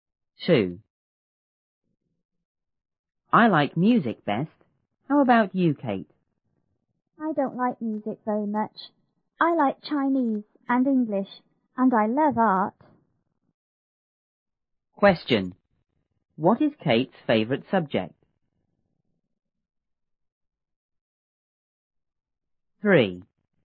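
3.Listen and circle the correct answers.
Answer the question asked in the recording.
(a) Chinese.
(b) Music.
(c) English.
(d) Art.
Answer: (d) Art.

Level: 初中英语广州版1B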